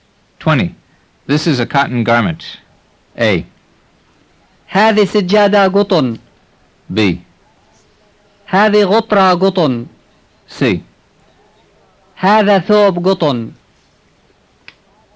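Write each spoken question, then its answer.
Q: This is a cotton garment.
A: C: هذا ثوب قطن.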